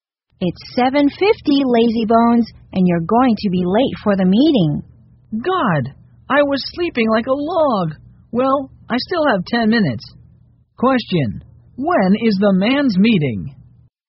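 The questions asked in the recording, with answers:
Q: Question, when is the man's meeting?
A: 8:00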